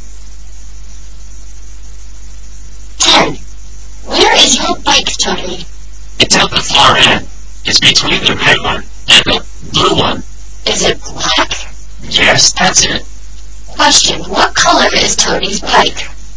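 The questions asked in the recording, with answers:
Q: Question, what color is Tony's bike?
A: Black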